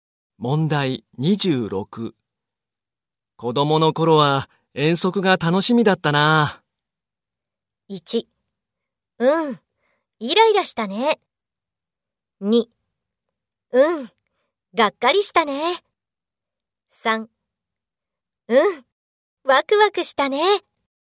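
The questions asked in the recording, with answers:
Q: 子供の頃は遠足が楽しみだったな。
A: 3: うん、ワクワクしたね。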